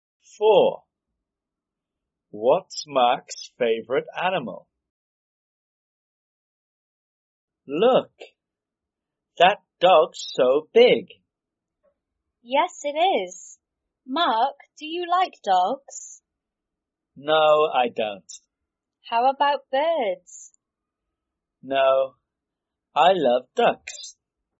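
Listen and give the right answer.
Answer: Ducks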